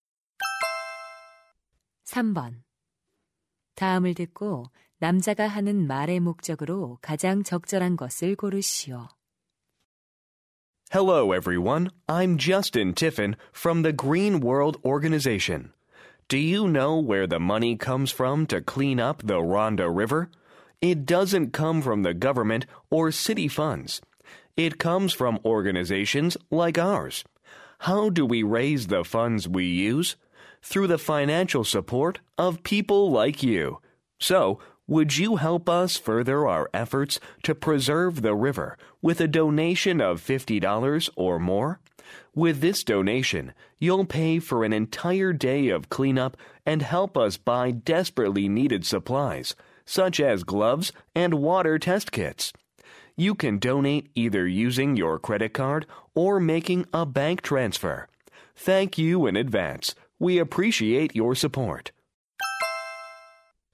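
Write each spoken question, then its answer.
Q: 다음을 듣고 남자가 하는 말의 목적으로 가장 적절한 것을 고르시오.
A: 강 정화 활동을 위한 기부를 요청하려고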